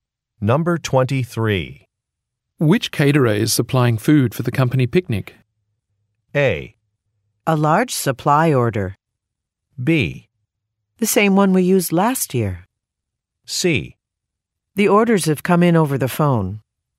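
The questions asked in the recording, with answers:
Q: Which caterer is supplying food for the company picnic?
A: B: The same one we used last year.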